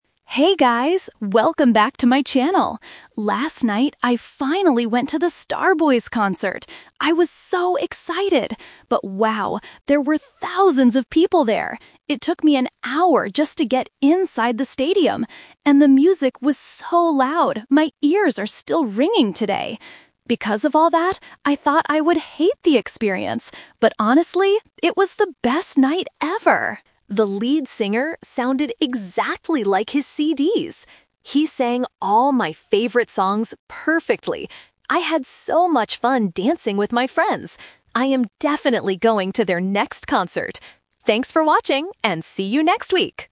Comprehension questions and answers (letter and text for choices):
Listen to a vlogger talking about a concert. Choose the correct answer (A, B, or C) for each question.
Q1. What was the problem before the concert started?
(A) The vlogger forgot her ticket.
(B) There were too many people.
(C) The band was late.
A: (B) There were too many people.

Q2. How did the vlogger feel about the loud music?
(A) She thought it would ruin the night, but she still had a great time.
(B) She loved the loud noise from the very beginning.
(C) She left the concert early because her ears hurt.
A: (A) She thought it would ruin the night, but she still had a great time.

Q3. What did the vlogger think about the lead singer?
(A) He didn't sing her favorite songs.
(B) He sounded just like his recorded music.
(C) He was not as good as the other singers.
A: (B) He sounded just like his recorded music.

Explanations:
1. The vlogger says, "...there were thousands of people there. It took me an hour just to get inside." Option (A) and (C) are plausible problems at a concert, but they are never mentioned in the audio.
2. This is the A2 Twist. She says the music was very loud and her ears are ringing, and states: "Because of all that, I thought I would hate the experience. But honestly, it was the best night ever!" Option (B) is incorrect because she didn't like the noise at first. Option (C) is a trap because she mentions her ears ringing, but she didn't leave early.
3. The vlogger clearly praises the singer: "The lead singer sounded exactly like his CDs." Option (A) is the opposite of what she said ("He sang all my favorite songs perfectly"). Option (C) is a distractor as no other singers were mentioned.

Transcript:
Vlogger: Hey guys! Welcome back to my channel. Last night, I finally went to the Star Boys concert. I was so excited! But wow, there were thousands of people there. It took me an hour just to get inside the stadium. And the music was so loud my ears are still ringing today. Because of all that, I thought I would hate the experience. But honestly, it was the best night ever! The lead singer sounded exactly like his CDs. He sang all my favorite songs perfectly. I had so much fun dancing with my friends. I am definitely going to their next concert! Thanks for watching, and see you next week!